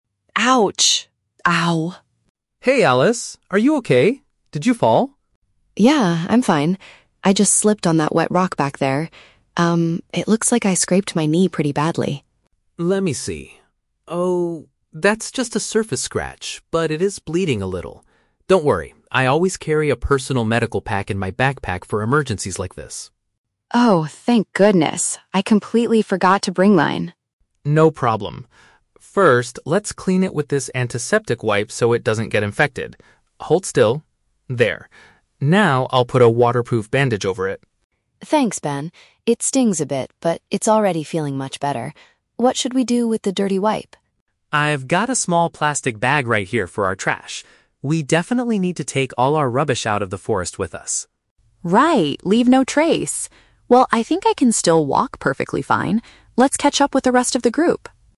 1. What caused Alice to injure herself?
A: She lost her balance on a slippery stone.

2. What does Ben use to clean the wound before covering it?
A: A small piece of material that prevents germs.

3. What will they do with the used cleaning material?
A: Carry it away with them to protect the environment.

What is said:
Alice: Ouch! Ow...
Ben: Hey, Alice! Are you okay? Did you fall?
Alice: Yeah, I'm fine. I just slipped on that wet rock back there. Um, it looks like I scraped my knee pretty badly.
Ben: Let me see. Oh, that's just a surface scratch, but it is bleeding a little. Don't worry, I always carry a personal medical pack in my backpack for emergencies like this.
Alice: Oh, thank goodness. I completely forgot to bring mine.
Ben: No problem. First, let's clean it with this antiseptic wipe so it doesn't get infected. Hold still... There. Now, I'll put a waterproof bandage over it.
Alice: Thanks, Ben. It stings a bit, but it's already feeling much better. What should we do with the dirty wipe?
Ben: I've got a small plastic bag right here for our trash. We definitely need to take all our rubbish out of the forest with us.
Alice: Right, leave no trace. Well, I think I can still walk perfectly fine. Let's catch up with the rest of the group!